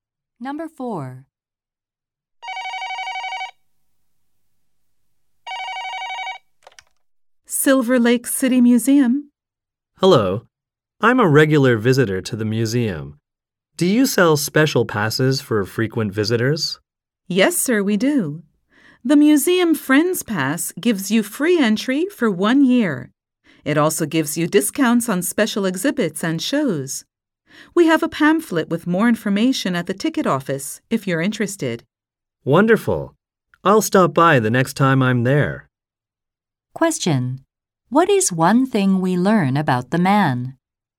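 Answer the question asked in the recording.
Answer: He often visits the museum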